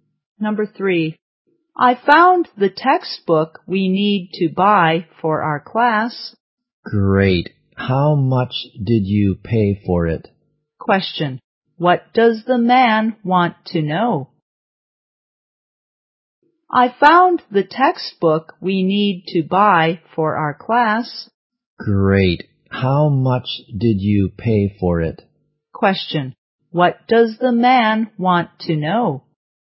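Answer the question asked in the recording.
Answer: The price of the textbook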